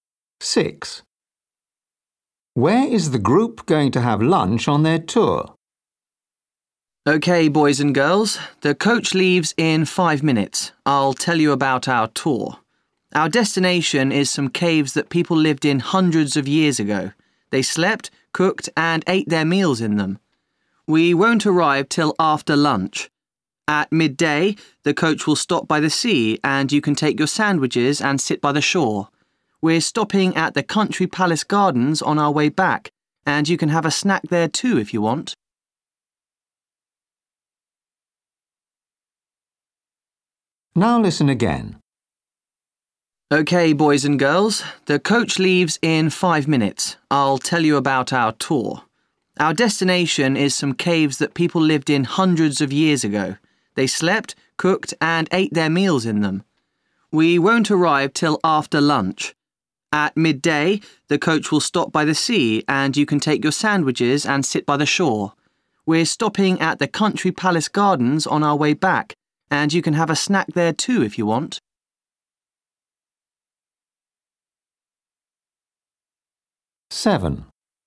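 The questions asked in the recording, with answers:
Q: Where is the group going to have lunch on their tour?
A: by the sea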